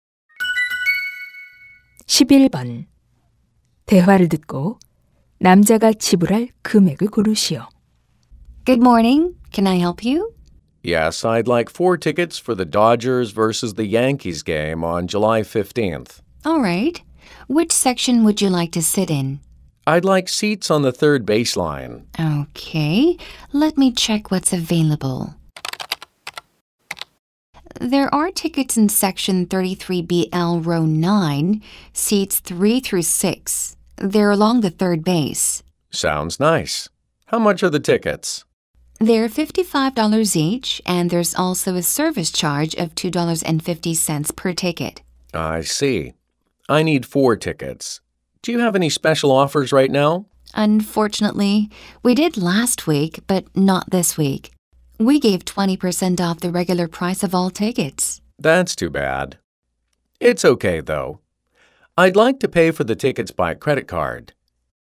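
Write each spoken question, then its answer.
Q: 대화를 듣고 남자가 지불할 금액을 고르시오.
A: 230달러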